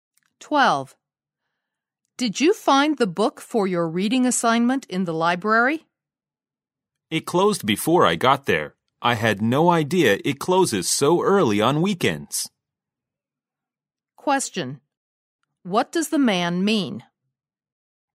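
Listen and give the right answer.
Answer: He didn't get the book because the library had already closed.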